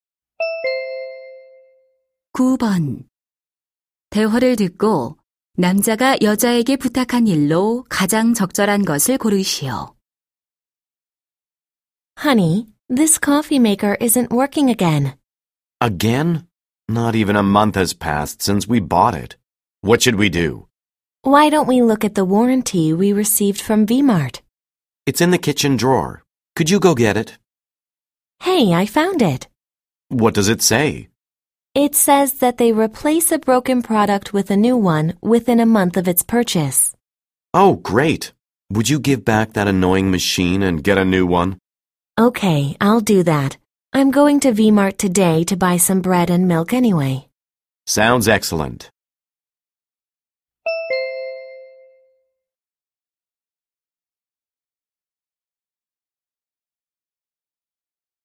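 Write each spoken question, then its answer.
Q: 대화를 듣고 남자가 여자에게 부탁한 일로 가장 적절한 것을 고르시오.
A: 고장 난 커피메이커를 새 것으로 교환해 오기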